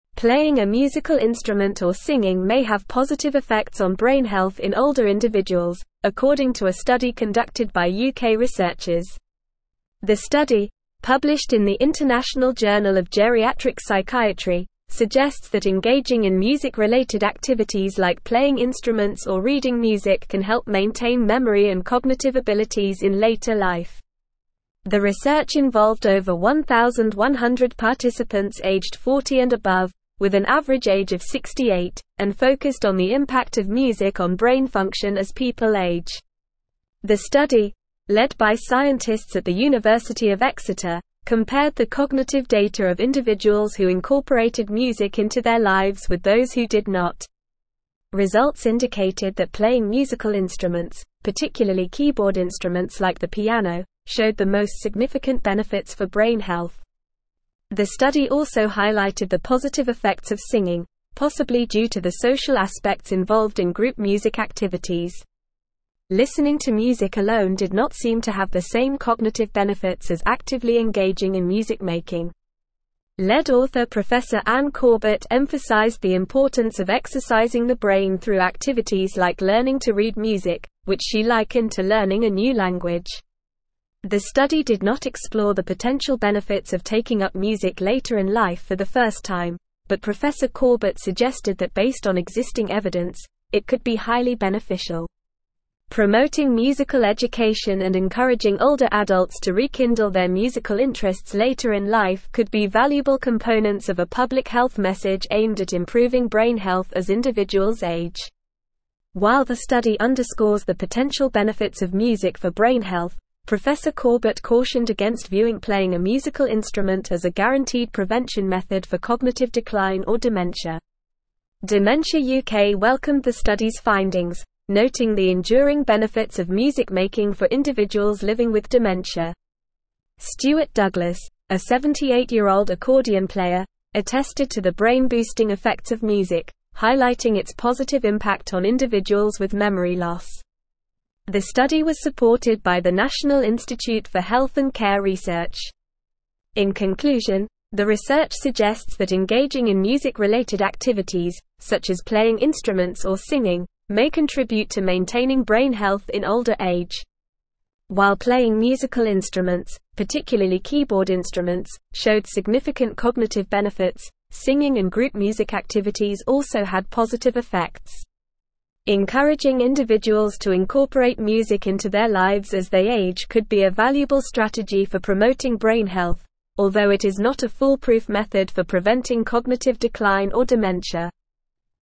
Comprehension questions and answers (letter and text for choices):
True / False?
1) Dementia UK criticized the study's findings, disputing the enduring benefits of music-making for individuals living with dementia.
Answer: False

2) The study was not supported by the National Institute for Health and Care Research.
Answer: False

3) Playing musical instruments, especially keyboard instruments like the piano, showed the most significant benefits for brain health in the study.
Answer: True

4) The lead author of the study, Prof Anne Corbett, emphasized the importance of exercising the brain through activities like learning to read music.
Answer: True

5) Playing a musical instrument or singing may have positive effects on brain health in (1)______ individuals, according to a study conducted by UK (2)______ers.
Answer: older

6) Playing a musical instrument or singing may have positive effects on brain health in (1)______ individuals, according to a study conducted by UK (2)______ers.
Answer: research

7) The study, published in the (3)______ Journal of Geriatric Psychiatry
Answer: International

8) suggests that engaging in music-related activities like playing (4)______ or reading music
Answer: instruments

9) Results (5)______ that playing musical instruments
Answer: indicated

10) The study also highlighted the positive effects of (6)______, possibly due to the social aspects involved in group music activities.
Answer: singing

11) which she (7)______ to learning a new language.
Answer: likened

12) taking up music later in life for the (8)______ time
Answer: first

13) Promoting (9)______ (10)______ and encouraging older (11)______ to rekindle their musical interests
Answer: education

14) Promoting (9)______ (10)______ and encouraging older (11)______ to rekindle their musical interests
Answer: adults

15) a guaranteed prevention (12)______ for cognitive decline or dementia.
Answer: method

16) engaging in music-related (13)______, such as playing instruments or singing, may contribute to maintaining (14)______ health in older age.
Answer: activities

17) engaging in music-related (13)______, such as playing instruments or singing, may contribute to maintaining (14)______ health in older age.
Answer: brain

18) singing and (15)______ music activities also had positive effects.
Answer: group

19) (16)______ individuals to incorporate music into their lives as they age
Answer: Encouraging

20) What did the study published in the International Journal of Geriatric Psychiatry suggest about the effects of music-related activities on brain health in older individuals?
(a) They may have positive effects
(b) They have no impact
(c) They have negative effects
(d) They are inconclusive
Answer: (a) They may have positive effects

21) According to the study, which musical activity showed the most significant benefits for brain health in older individuals?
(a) Playing keyboard instruments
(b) Listening to music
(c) Singing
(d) Playing wind instruments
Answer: (a) Playing keyboard instruments

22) What did the study find about the cognitive benefits of listening to music alone?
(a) It had the most significant benefits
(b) It did not show the same cognitive benefits as actively engaging in music-making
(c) It had similar benefits to playing musical instruments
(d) It was inconclusive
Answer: (b) It did not show the same cognitive benefits as actively engaging in music-making

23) What did lead author Prof Anne Corbett compare learning to read music to in the study?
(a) Learning to cook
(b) Learning to drive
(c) Learning to swim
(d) Learning a new language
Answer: (d) Learning a new language

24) What did Prof Corbett suggest could be highly beneficial based on existing evidence in the study?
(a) Giving up music later in life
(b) Taking up music later in life for the first time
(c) Avoiding music altogether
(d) Listening to music passively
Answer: (b) Taking up music later in life for the first time

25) What did Prof Corbett emphasize as a valuable component of a public health message aimed at improving brain health as individuals age?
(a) Avoiding music-related activities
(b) Discouraging older adults from engaging in music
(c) Promoting musical education and encouraging older adults to rekindle their musical interests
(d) Focusing solely on listening to music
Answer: (c) Promoting musical education and encouraging older adults to rekindle their musical interests

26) What did Prof Corbett caution against in terms of playing a musical instrument and cognitive decline in the study?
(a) Stopping individuals from playing instruments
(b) Encouraging individuals to play more instruments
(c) Viewing it as a guaranteed prevention method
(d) Promoting it as a cure for dementia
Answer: (c) Viewing it as a guaranteed prevention method

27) What did Dementia UK note about the benefits of music-making for individuals living with dementia in response to the study's findings?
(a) They stated there were no benefits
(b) They mentioned negative effects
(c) They disagreed with the study's findings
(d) They highlighted the enduring benefits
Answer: (d) They highlighted the enduring benefits

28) How many participants were involved in the study and what was their average age?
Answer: The study involved over 1,100 participants aged 40 and above, with an average age of 68.

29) Which type of musical instrument showed the most significant benefits for brain health?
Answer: Keyboard instruments, like the piano, showed the most significant benefits for brain health.

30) What did lead author Prof Anne Corbett compare learning to read music to?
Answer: Prof Anne Corbett compared learning to read music to learning a new language.

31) Did the study explore the potential benefits of taking up music later in life for the first time?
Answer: No, the study did not explore the potential benefits of taking up music later in life for the first time.

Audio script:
Playing a musical instrument or singing may have positive effects on brain health in older individuals, according to a study conducted by UK researchers. The study, published in the International Journal of Geriatric Psychiatry, suggests that engaging in music-related activities like playing instruments or reading music can help maintain memory and cognitive abilities in later life. The research involved over 1,100 participants aged 40 and above, with an average age of 68, and focused on the impact of music on brain function as people age.
The study, led by scientists at the University of Exeter, compared the cognitive data of individuals who incorporated music into their lives with those who did not. Results indicated that playing musical instruments, particularly keyboard instruments like the piano, showed the most significant benefits for brain health. The study also highlighted the positive effects of singing, possibly due to the social aspects involved in group music activities. Listening to music alone did not seem to have the same cognitive benefits as actively engaging in music-making.
Lead author Prof Anne Corbett emphasized the importance of exercising the brain through activities like learning to read music, which she likened to learning a new language. The study did not explore the potential benefits of taking up music later in life for the first time, but Prof Corbett suggested that based on existing evidence, it could be highly beneficial. Promoting musical education and encouraging older adults to rekindle their musical interests later in life could be valuable components of a public health message aimed at improving brain health as individuals age.
While the study underscores the potential benefits of music for brain health, Prof Corbett cautioned against viewing playing a musical instrument as a guaranteed prevention method for cognitive decline or dementia. Dementia UK welcomed the study's findings, noting the enduring benefits of music-making for individuals living with dementia. Stuart Douglas, a 78-year-old accordion player, attested to the brain-boosting effects of music, highlighting its positive impact on individuals with memory loss. The study was supported by the National Institute for Health and Care Research.
In conclusion, the research suggests that engaging in music-related activities, such as playing instruments or singing, may contribute to maintaining brain health in older age. While playing musical instruments, particularly keyboard instruments, showed significant cognitive benefits, singing and group music activities also had positive effects. Encouraging individuals to incorporate music into their lives as they age could be a valuable strategy for promoting brain health, although it is not a foolproof method for preventing cognitive decline or dementia.

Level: Level 4